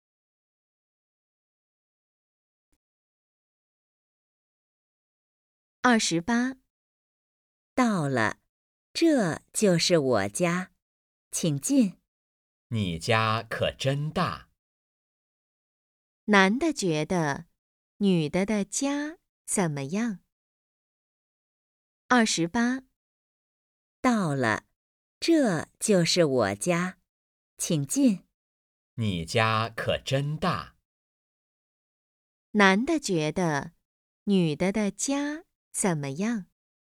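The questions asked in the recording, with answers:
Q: 男的觉得女的的家怎么样?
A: 很大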